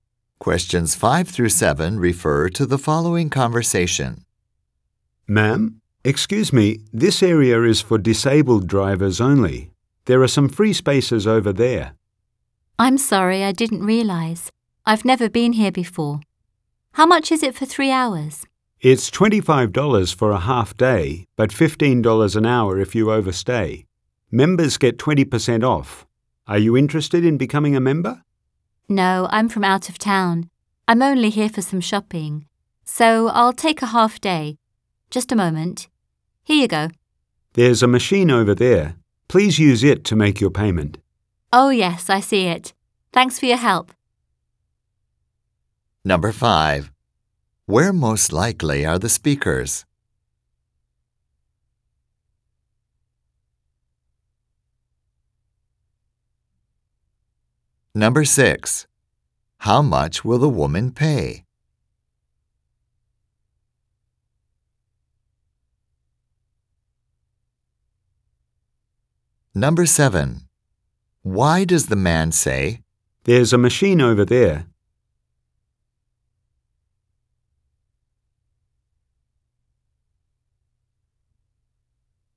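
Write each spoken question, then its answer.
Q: Where most likely are the speakers?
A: In a parking lot

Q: How much will the woman pay?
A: $25

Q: Why does the man say, "There's a machine over there.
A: To show the woman where to make her payment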